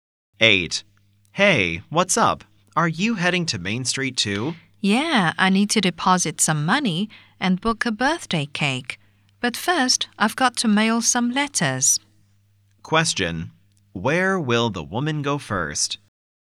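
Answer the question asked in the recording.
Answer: The post office.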